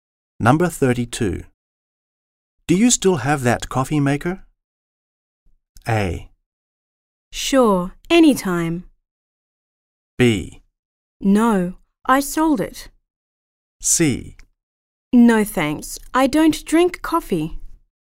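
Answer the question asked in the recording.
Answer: B: No, I sold it.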